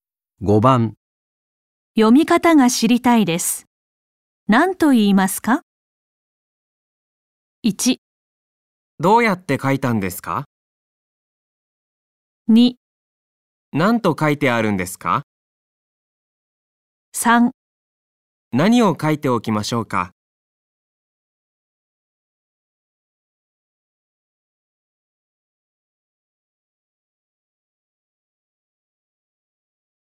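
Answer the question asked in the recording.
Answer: 2: 何と書いてあるんですか?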